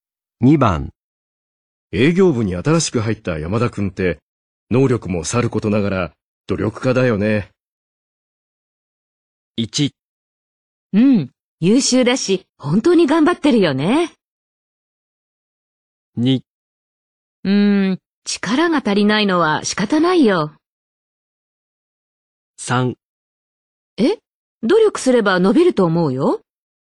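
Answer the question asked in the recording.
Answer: 1: うん、優秀だし、本当に頑張ってるよね。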